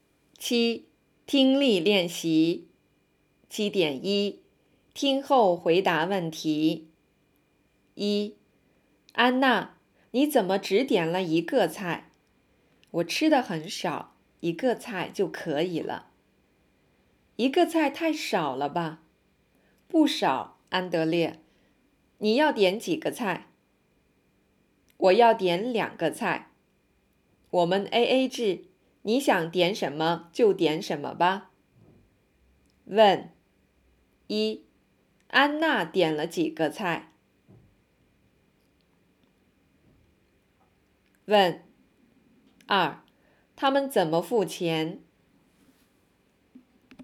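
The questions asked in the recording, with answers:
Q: 安娜点了几个菜?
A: 一个菜

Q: 他们怎么付钱?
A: AA制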